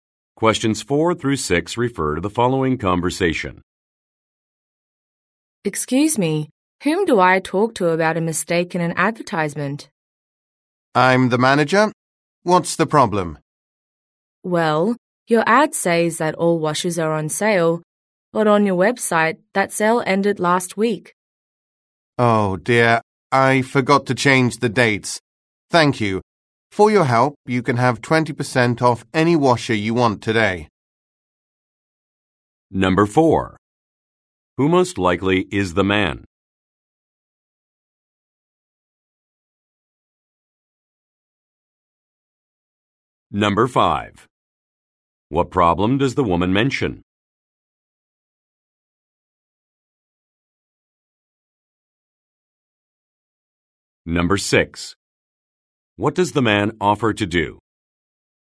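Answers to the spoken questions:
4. A store manager
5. The ad shows a sale that already ended
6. Give 20% off any washer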